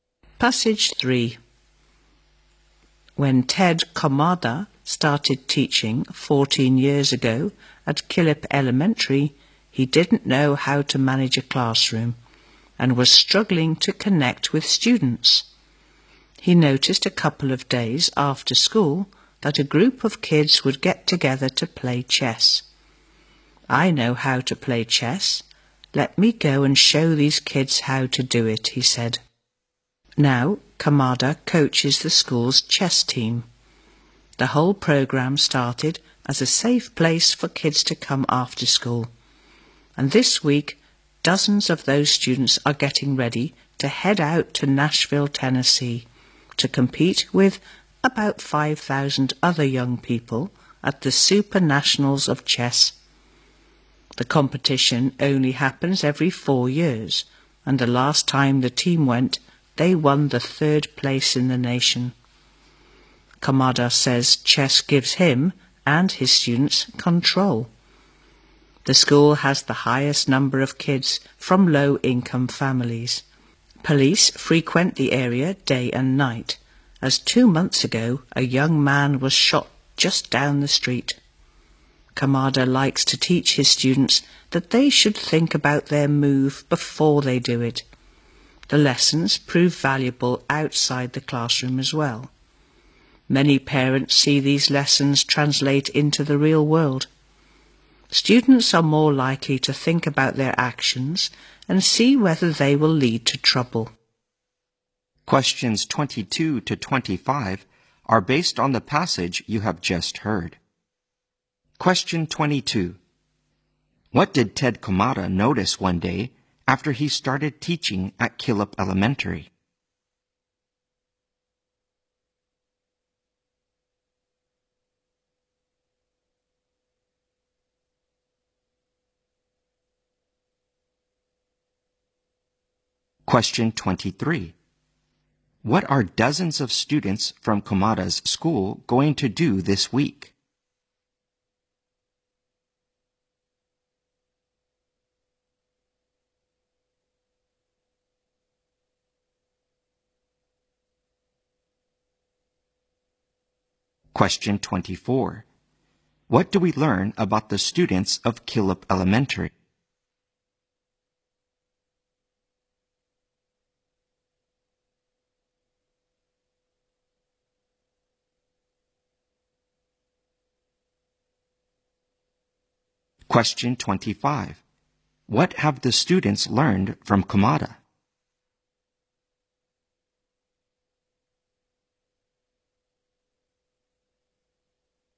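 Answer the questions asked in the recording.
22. A group of kids got together after school to play chess.
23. Compete in the Super Nationals of Chess in Nashville.
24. Many of them come from low-income families.
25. To think about their moves and actions before making them.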